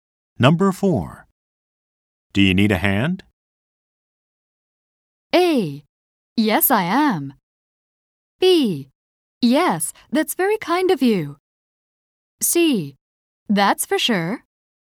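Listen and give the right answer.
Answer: B: Yes, that's very kind of you.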